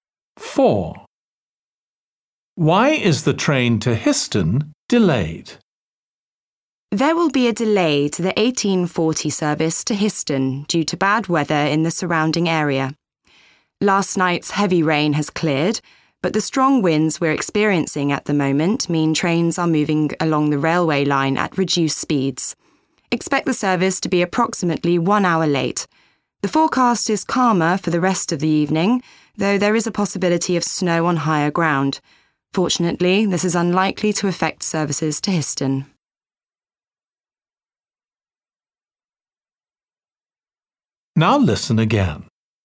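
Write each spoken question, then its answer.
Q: Why is the train to Histon delayed?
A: strong winds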